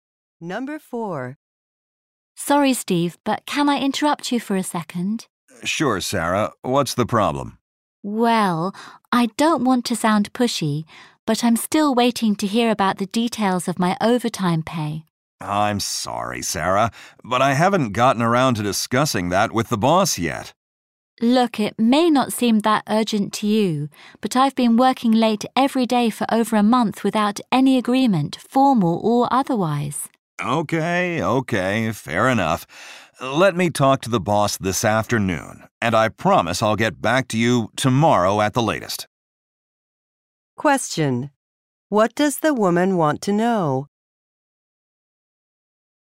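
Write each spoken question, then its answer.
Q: What does the woman want to know?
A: The details of her overtime pay.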